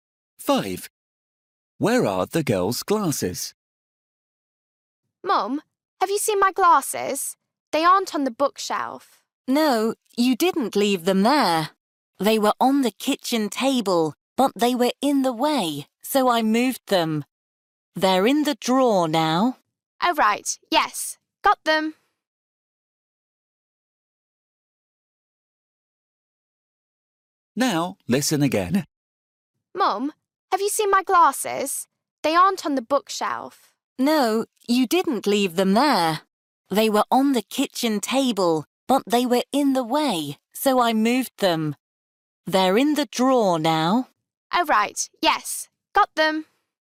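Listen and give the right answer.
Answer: in the drawer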